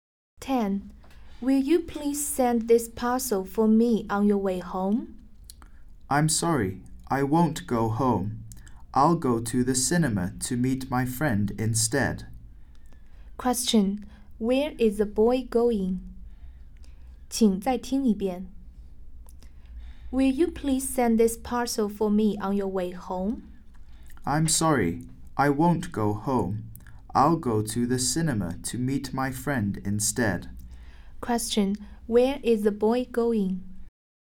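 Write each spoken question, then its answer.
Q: Where is the boy going?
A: To the cinema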